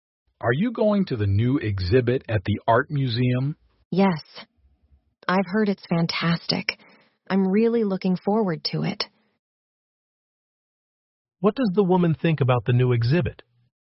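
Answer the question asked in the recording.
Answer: She has heard it's fantastic and looks forward to it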